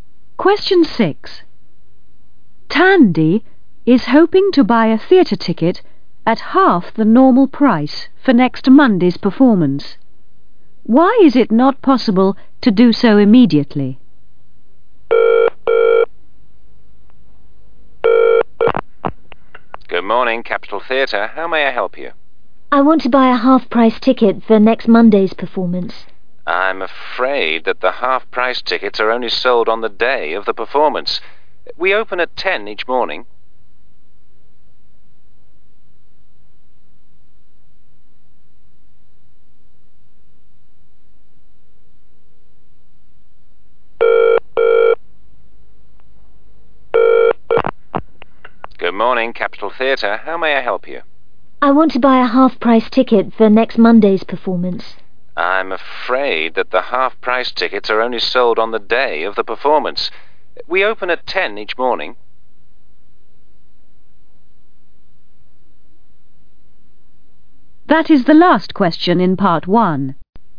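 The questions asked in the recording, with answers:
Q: Why is it not possible to do so immediately?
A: Half-price tickets are only sold on the day of the performance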